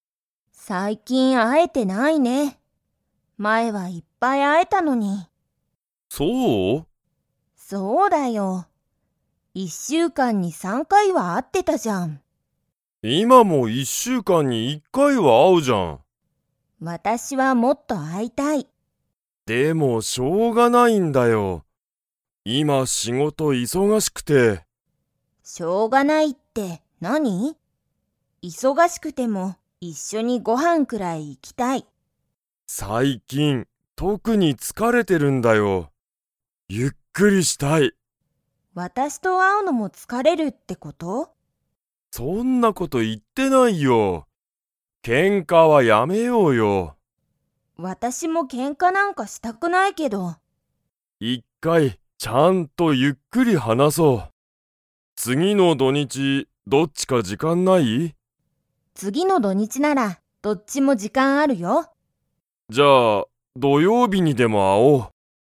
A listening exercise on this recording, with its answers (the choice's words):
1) 今いま、ゆかりとしんじは一週間いっしゅうかんに は会あってる。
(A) 一回いっかい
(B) 二回にかい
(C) 三回さんかい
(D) 四回よんかい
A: 一回いっかい

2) ゆかりとしんじは、次つぎの土日どにちに会あいますか?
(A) はい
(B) いいえ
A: はい

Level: Level 4